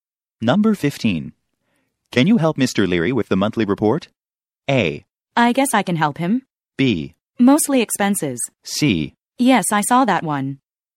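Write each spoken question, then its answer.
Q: Can you help Mr. Leary with the monthly report?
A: A: I guess I can help him.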